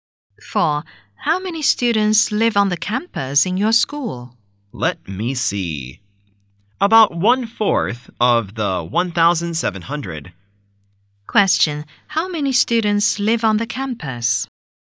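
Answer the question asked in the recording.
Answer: About 425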